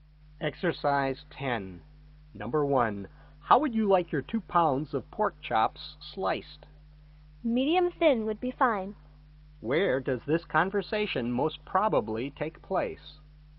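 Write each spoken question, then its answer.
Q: Where does this conversation most probably take place?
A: At a butcher's shop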